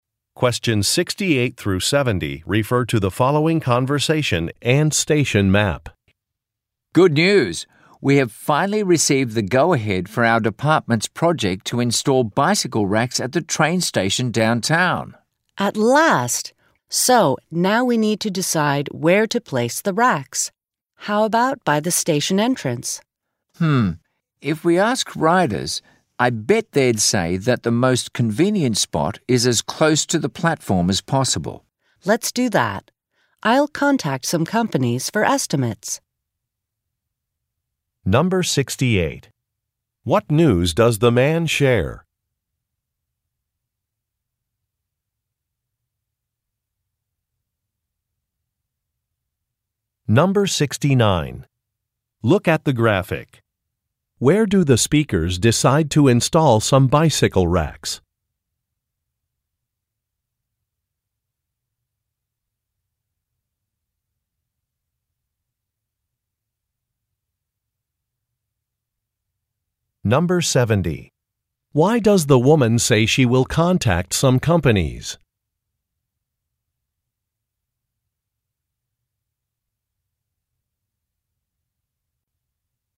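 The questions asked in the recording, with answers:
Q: What news does the man share?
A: The department's project to install bicycle racks at the downtown train station was approved.

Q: Why does the woman say she will contact some companies?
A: To get estimates.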